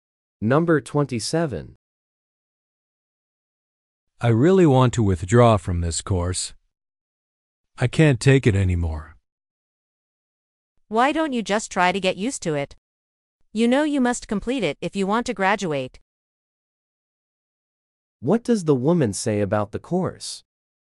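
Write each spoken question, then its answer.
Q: What does the woman say about the course?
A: It is required for graduation.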